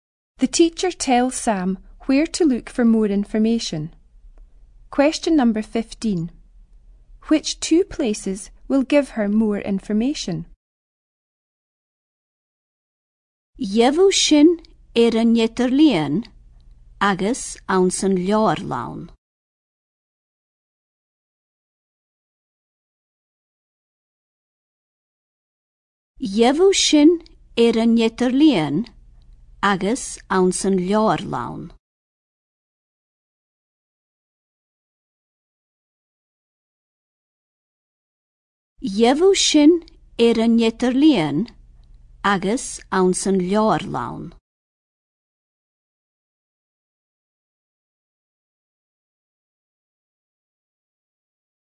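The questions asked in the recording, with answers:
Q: Which two places will give her more information?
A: The internet and the library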